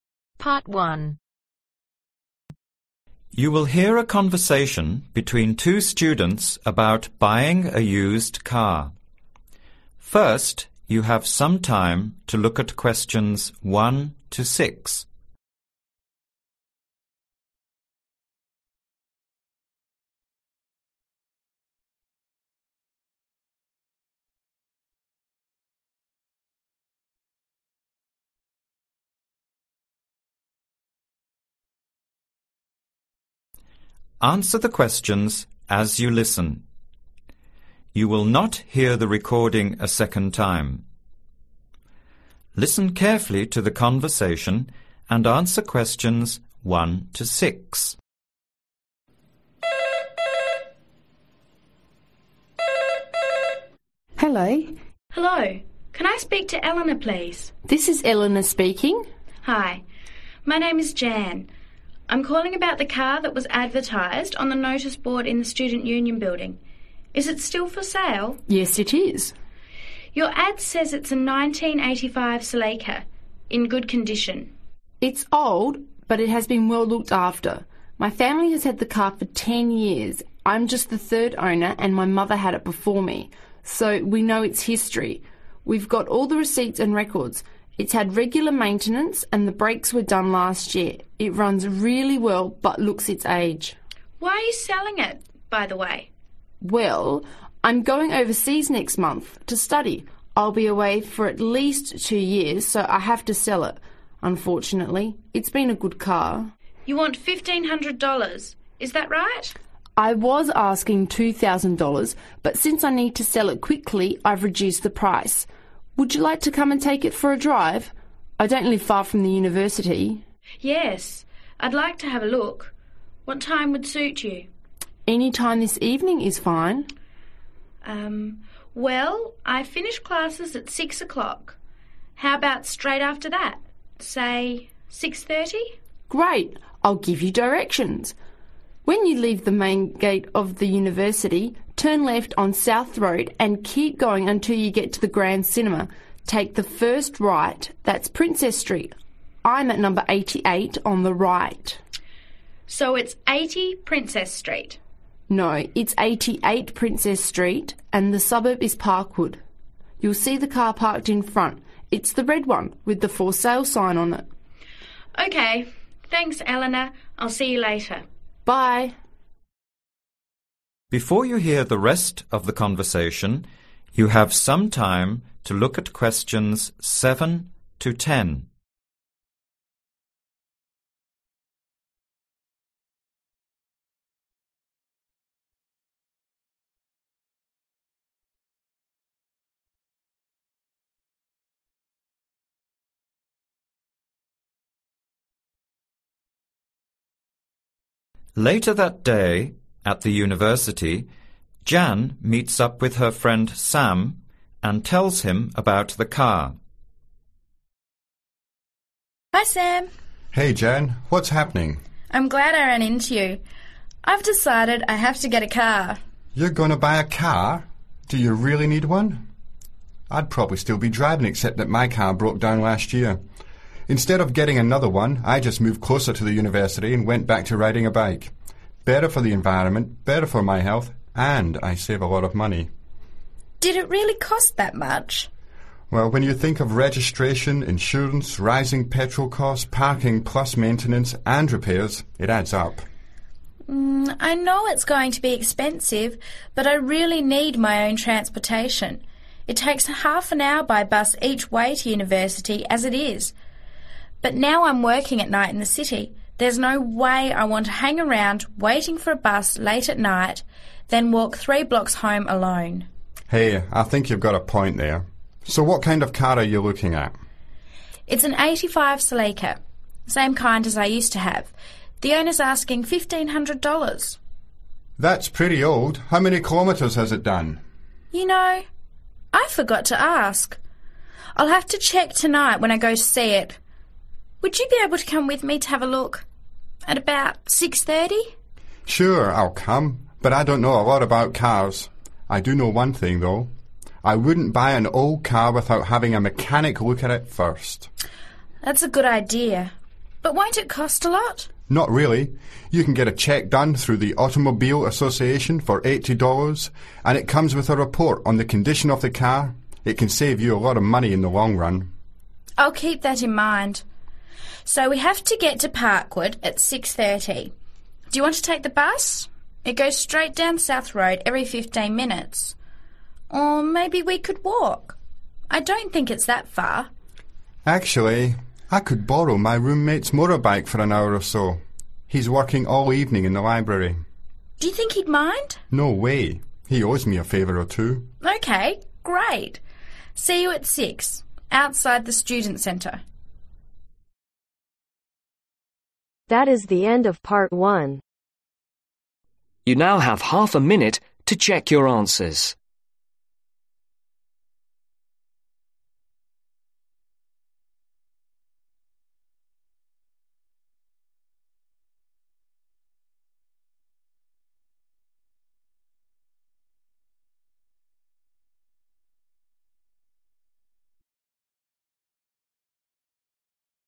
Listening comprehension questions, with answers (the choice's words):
Complete the form below. Write NO MORE THAN TWO WORDS AND/OR A NUMBER for each answer.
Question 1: Number of Owners : (1)............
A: 3

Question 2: (2)............ done last year.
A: Brakes

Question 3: Reason for Selling : owner (3)...........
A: Going overseas

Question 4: asking Price : (4)..........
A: $1500

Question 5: Appointment Time : (5)............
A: 6.30

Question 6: Address : (6)............ street, Park wood.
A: 88 princess

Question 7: What happened to Sam's car ?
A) It was replaced by another one.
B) It broke down.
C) It was stolen.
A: It broke down.

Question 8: Why does Jan need a car now ?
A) She lives too far from the university.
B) She spends too much time on the bus.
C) She would feel safer at night with a car.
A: She would feel safer at night with a car.

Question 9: What does Sam recommend ?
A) Check the service record.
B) Avoid buying an old car.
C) Get a mechanical inspection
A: Get a mechanical inspection

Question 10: How are they traveling to Elena's ?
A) By motorcycle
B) On foot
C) by bus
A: By motorcycle